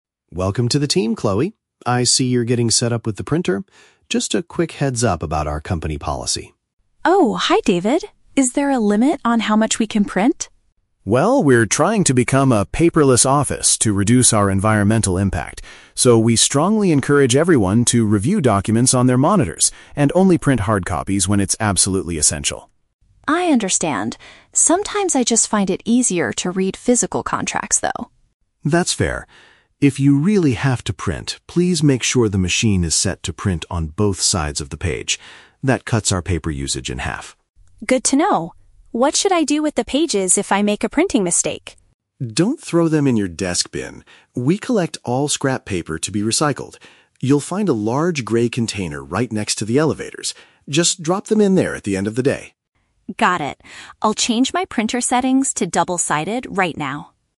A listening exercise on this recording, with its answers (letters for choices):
Listen to the conversation between a manager and a new employee, then choose the correct answer (A, B, or C) for each question.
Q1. What is the company's main rule regarding printing?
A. Employees should only print documents if it is completely necessary.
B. Employees are not allowed to print any physical contracts.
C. Employees must pay a fee if they print too many pages.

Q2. What must Chloe do if she decides to print something?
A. Ask her manager to check the contract first.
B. Ensure the text is printed on both sides of the paper.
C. Use the special grey paper provided by the office.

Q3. Where should Chloe put her ruined or unwanted prints?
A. In the normal garbage can under her desk.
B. In the recycling machine next to the printer.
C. In a specific collection bin near the lifts.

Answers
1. A
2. B
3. C

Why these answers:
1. David says to only print "when it's absolutely essential." The phrase "completely necessary" is a paraphrase of "absolutely essential." Option (B) is a trap; Chloe mentions "physical contracts," but David says "That's fair" (she is allowed to print them if needed, not forbidden). Option (C) is plausible because Chloe asks if there is a "limit," but a fee is never mentioned.
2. David tells Chloe to make sure the machine is set to "print on both sides of the page." This is also paraphrased by Chloe at the end as "double-sided." Option (A) is a trap; the words "manager" and "contracts" are in the audio, but she doesn't need his permission to print. Option (C) is a trap; "grey" is the color of the recycling container, not the paper.
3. David says the grey container is "right next to the elevators." The word "lifts" is a British English synonym (paraphrase) for "elevators." Option (A) is a trap; David explicitly tells her, "Don't throw them in your desk bin." Option (B) is a trap; the "printer" is mentioned earlier, but the recycling bin is by the elevators, not the printer.

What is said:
David: Welcome to the team, Chloe. I see you're getting set up with the printer. Just a quick heads-up about our company policy.
Chloe: Oh, hi David. Is there a limit on how much we can print?
David: Well, we're trying to become a paperless office to reduce our environmental impact. So, we strongly encourage everyone to review documents on their monitors and only print hard copies when it's absolutely essential.
Chloe: I understand. Sometimes I just find it easier to read physical contracts, though.
David: That's fair. If you really have to print, please make sure the machine is set to print on both sides of the page. That cuts our paper usage in half.
Chloe: Good to know. What should I do with the pages if I make a printing mistake?
David: Don't throw them in your desk bin. We collect all scrap paper to be recycled. You'll find a large grey container right next to the elevators. Just drop them in there at the end of the day.